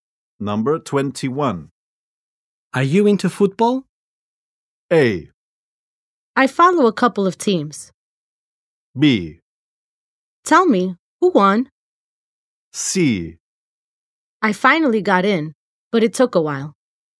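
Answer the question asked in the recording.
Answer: A: I follow a couple of teams.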